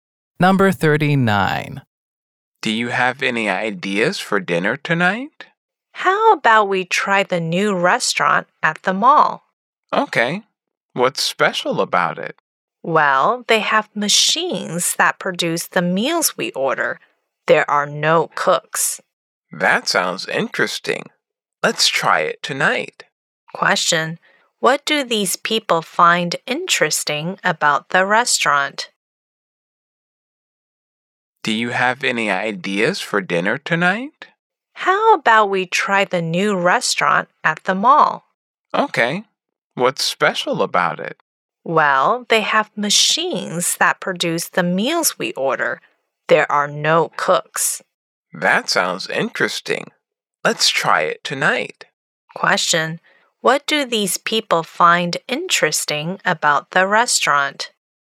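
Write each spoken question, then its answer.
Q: What do these people find interesting about the restaurant?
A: Machines make the meals; there are no cooks.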